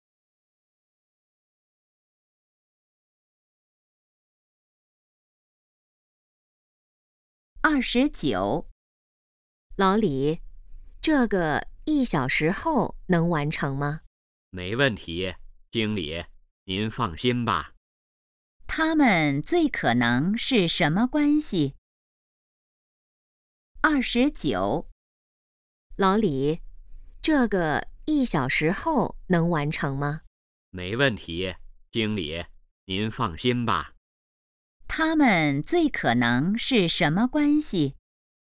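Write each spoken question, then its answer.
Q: 他们最可能是什么关系?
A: 经理和职员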